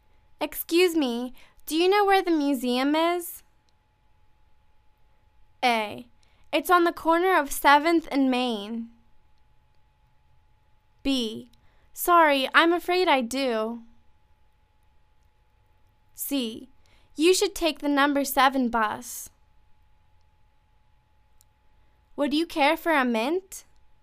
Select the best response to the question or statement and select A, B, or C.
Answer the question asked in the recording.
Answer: It's on the corner of 7th and Main.